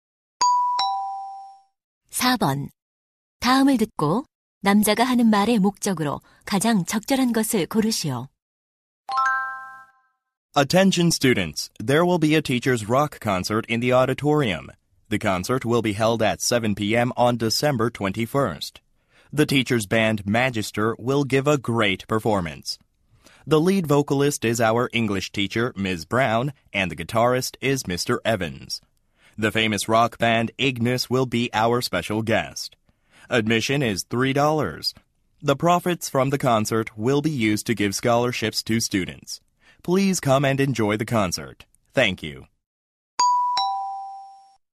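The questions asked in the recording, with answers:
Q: 다음을 듣고 남자가 하는 말의 목적으로 가장 적절한 것을 고르시오.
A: 교사 록 콘서트를 홍보하고 참석을 권하려고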